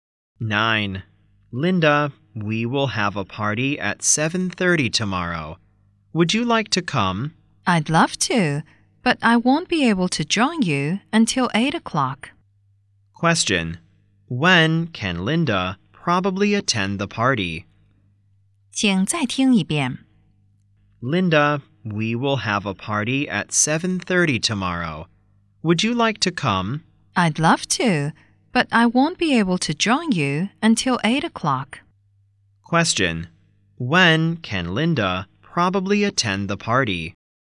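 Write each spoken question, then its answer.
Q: Question, when can Linda probably attend the party?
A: At 8 o'clock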